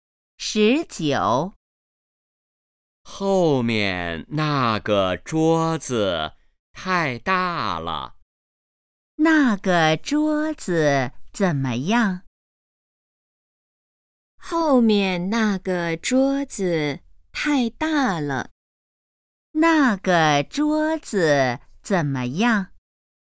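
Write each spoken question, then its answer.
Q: 那个桌子怎么样?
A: 太大了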